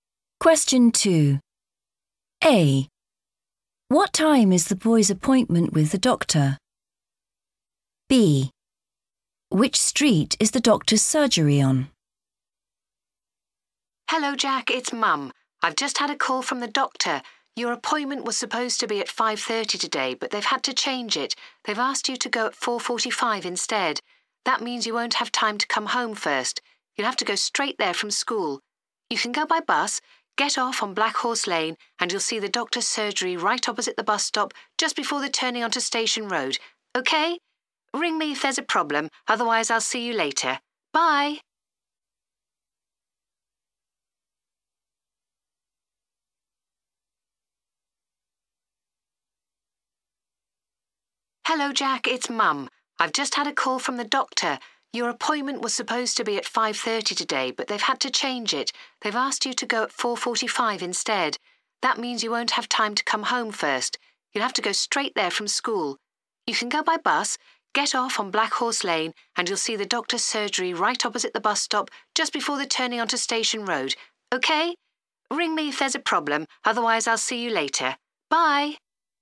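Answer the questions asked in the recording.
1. 4:45
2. Black Horse Lane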